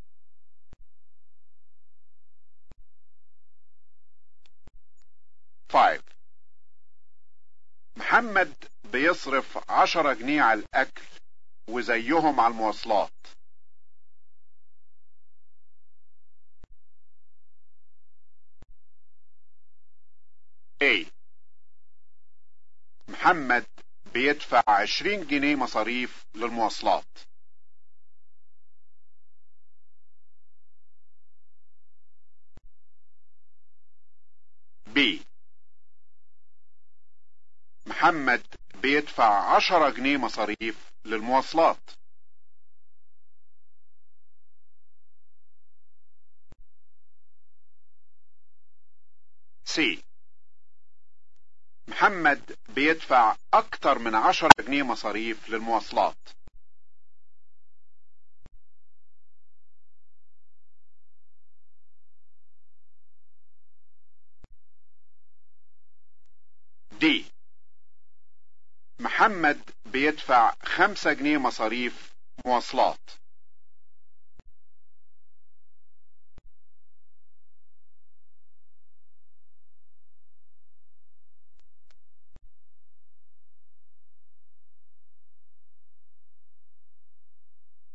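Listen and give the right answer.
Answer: B: محمد بيدفع 10 جنيه مصاريف للمواصلات.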